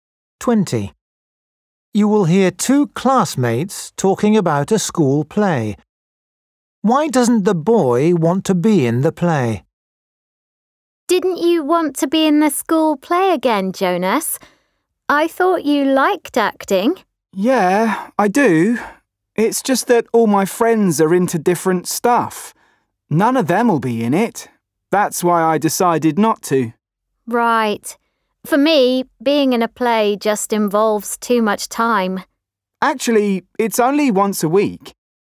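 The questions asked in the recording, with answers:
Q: Why doesn't the boy want to be in the play?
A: none of his friends will be in it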